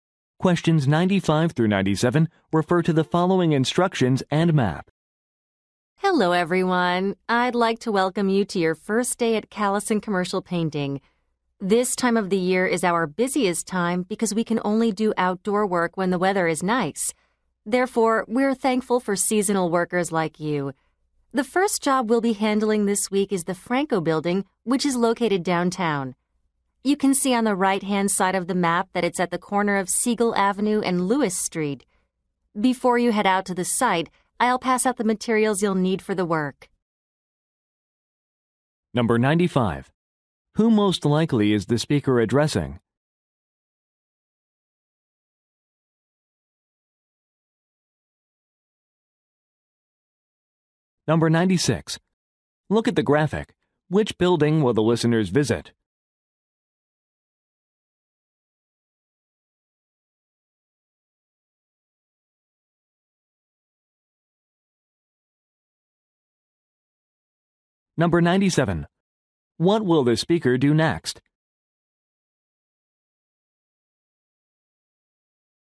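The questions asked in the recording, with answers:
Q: Who most likely is the speaker addressing?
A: Seasonal painters

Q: What will the speaker do next?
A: Hand out work materials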